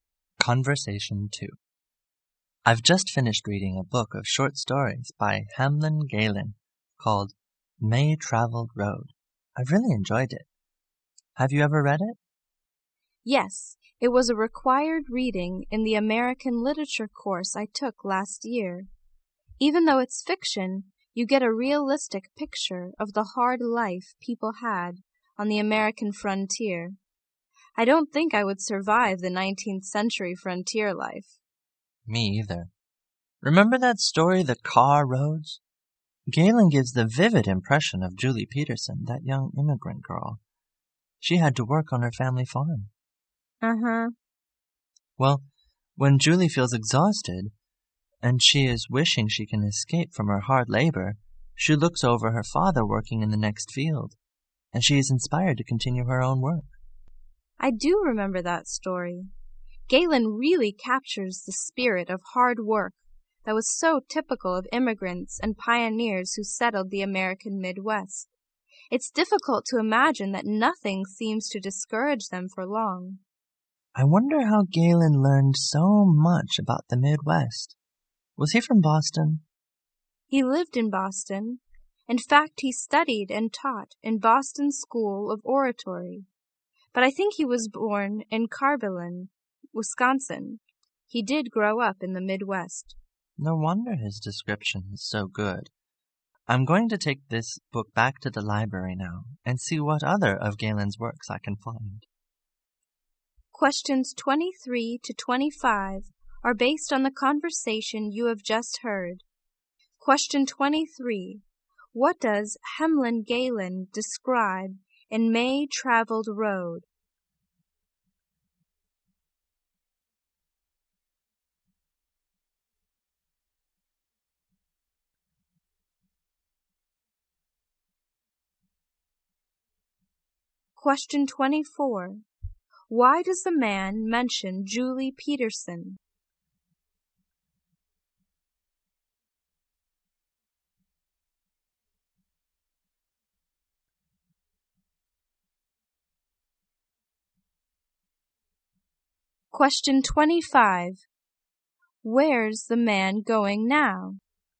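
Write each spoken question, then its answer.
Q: What does Hamlyn Galen describe in May Traveled Road?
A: The hard life of people on the American frontier.

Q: Why does the man mention Julie Peterson?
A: To show the spirit of hard work of immigrants and pioneers.

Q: Where's the man going now?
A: To the library.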